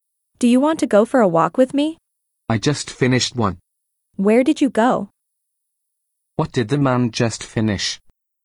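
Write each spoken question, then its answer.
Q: What did the man just finish?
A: A walk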